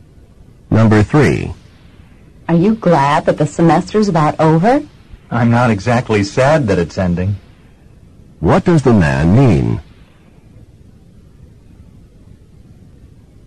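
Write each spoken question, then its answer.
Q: What does the man mean?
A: He's glad the semester is ending.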